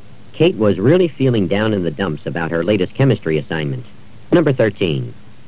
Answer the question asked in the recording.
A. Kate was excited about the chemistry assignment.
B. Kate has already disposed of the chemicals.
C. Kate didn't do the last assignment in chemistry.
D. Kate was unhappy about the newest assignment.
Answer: D. Kate was unhappy about the newest assignment.

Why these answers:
Kate was really feeling down in the dumps about her latest chemistry assignment.

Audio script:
11. Why don't we move the chairs inside?
Kate was really feeling down in the dumps about her latest chemistry assignment.